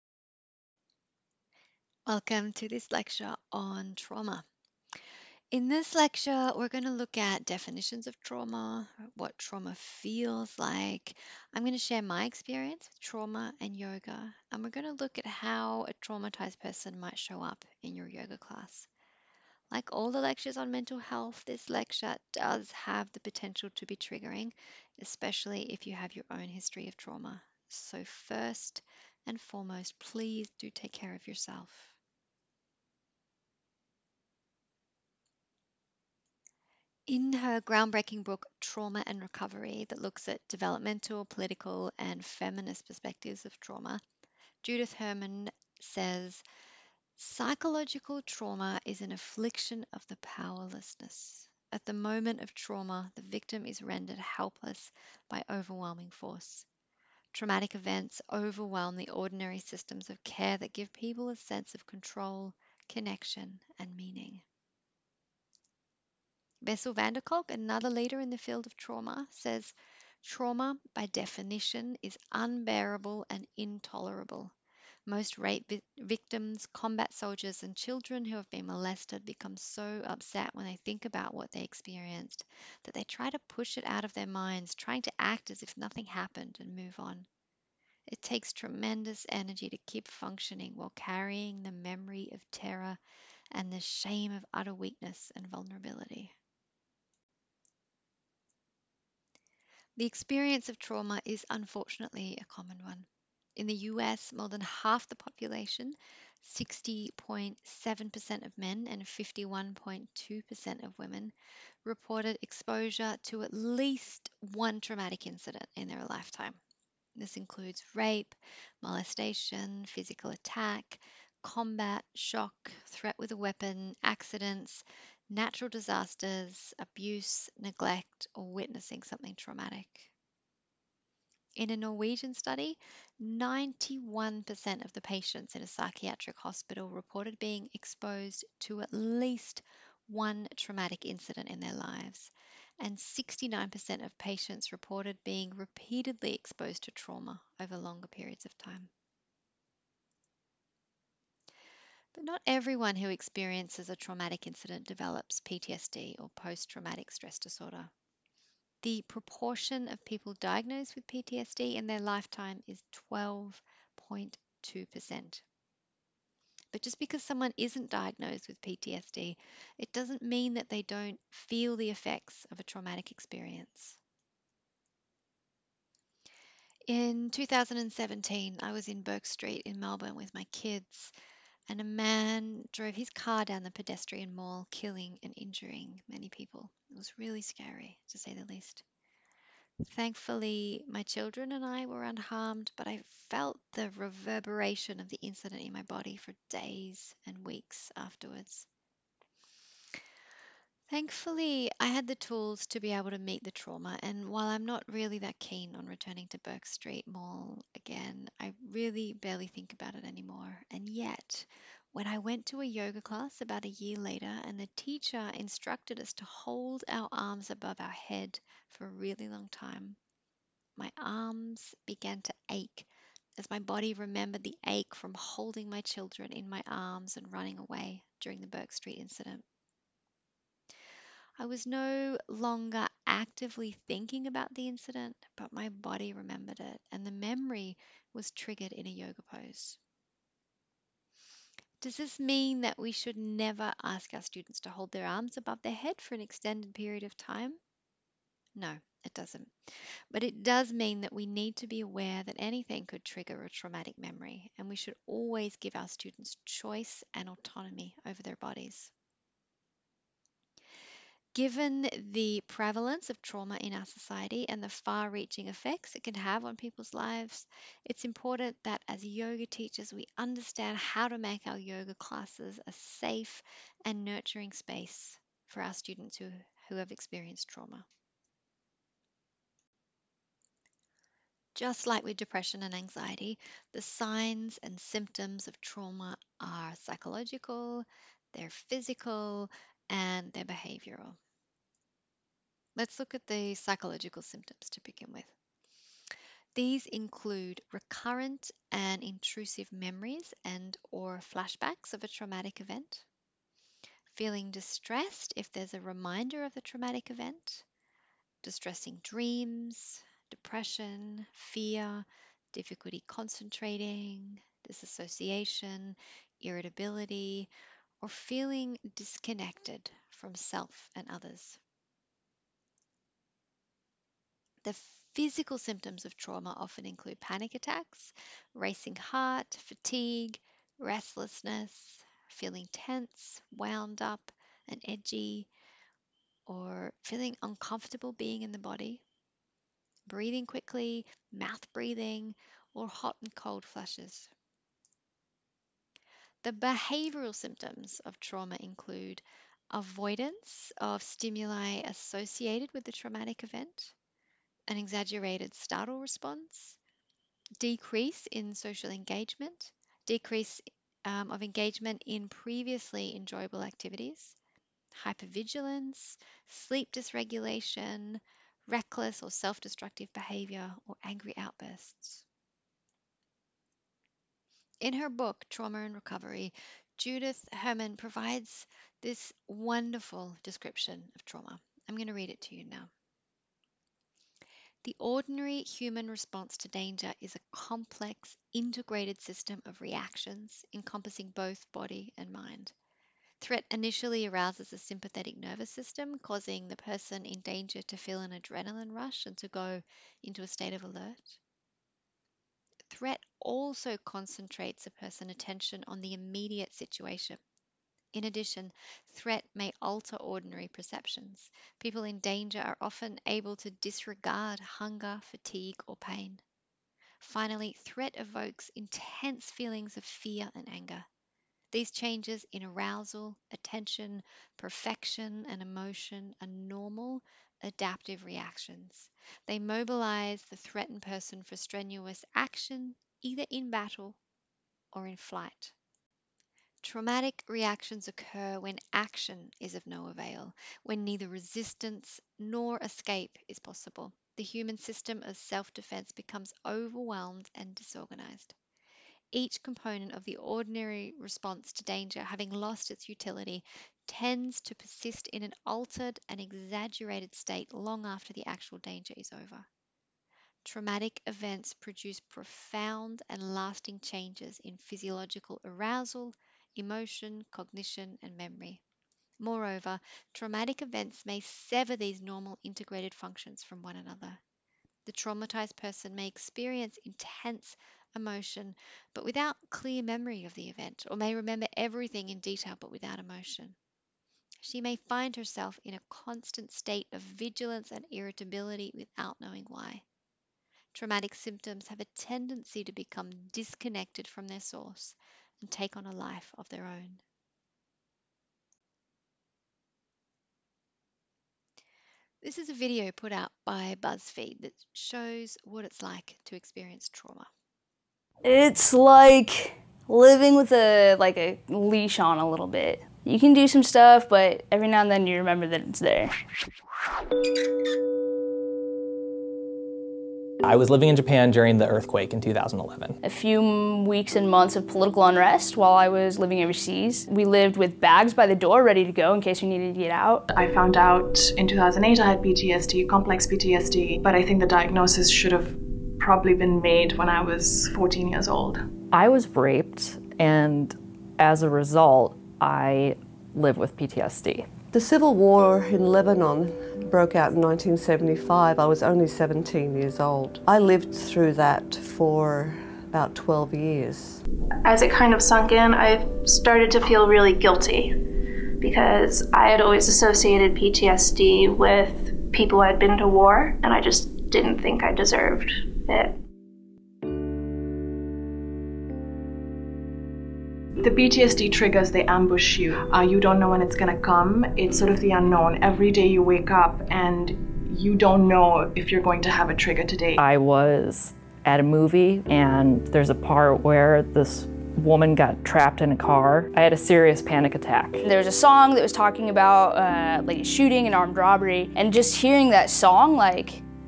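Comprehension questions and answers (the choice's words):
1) Which statistics are true of trauma?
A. More men than women have been exposed to a traumatic incident.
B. 91% of patients in a psychiatric hospital in Norway reported being exposed to at least one traumatic incident in their life.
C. 12.2% of people who have experienced a traumatic incident develop Posttraumatic Stress Disorder.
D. All of the above.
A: All of the above.

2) The signs and symptoms of trauma are:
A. Psychological.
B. Physical.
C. Behavioural.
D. All of the above.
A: All of the above.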